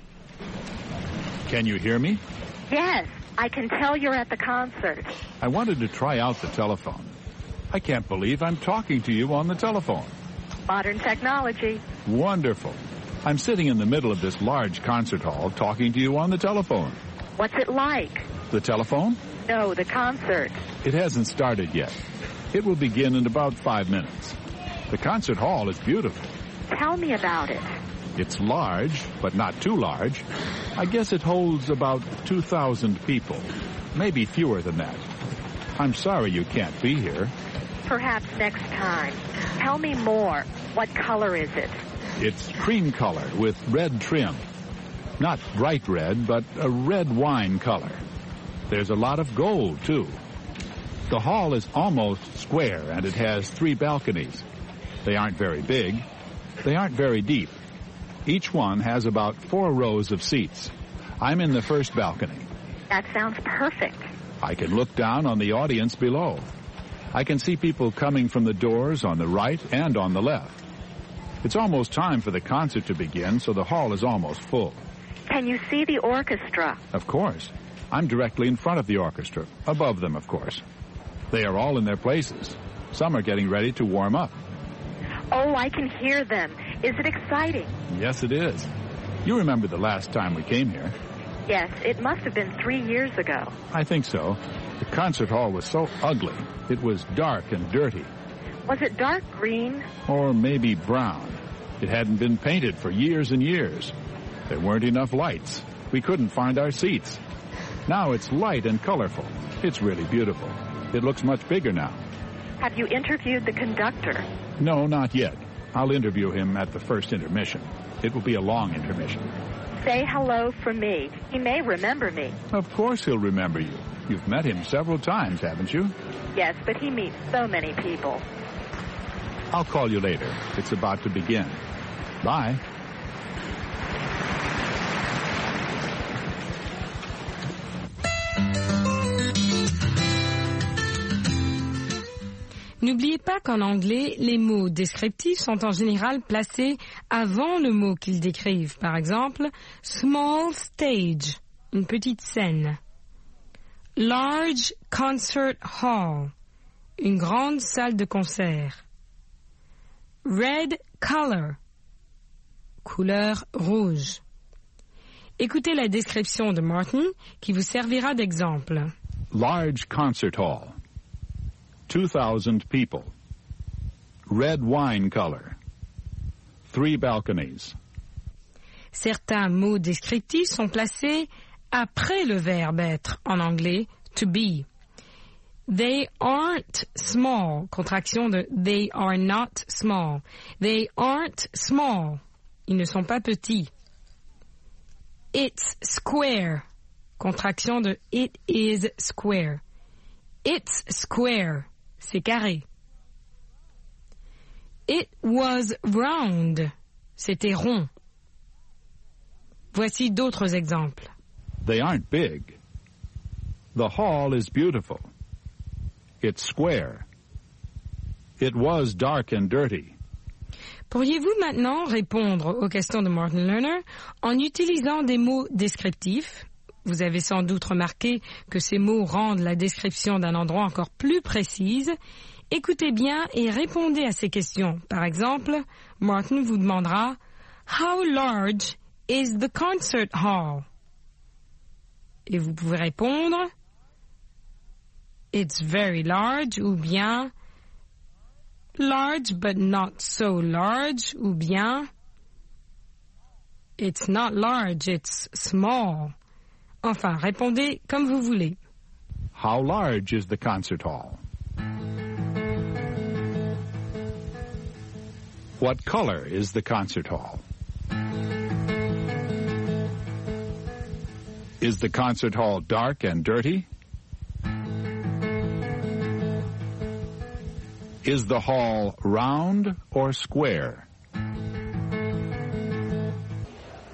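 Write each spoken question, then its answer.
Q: How large is the concert hall?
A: It's large, but not too large; it holds about 2,000 people.

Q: What color is the concert hall?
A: Cream color with red wine trim and a lot of gold.

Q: Is the concert hall dark and dirty?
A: No, it's light and colorful now.

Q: Is the hall round or square?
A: It's almost square.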